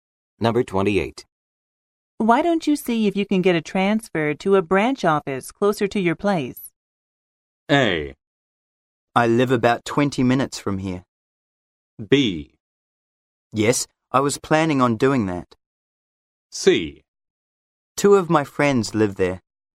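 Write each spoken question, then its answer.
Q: Why don't you see if you can get a transfer to a branch office closer to your place?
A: B: Yes, I was planning on doing that.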